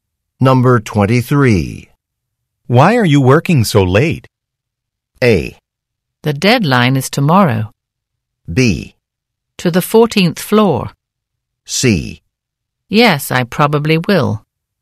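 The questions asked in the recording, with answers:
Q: Why are you working so late?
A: A: The deadline is tomorrow.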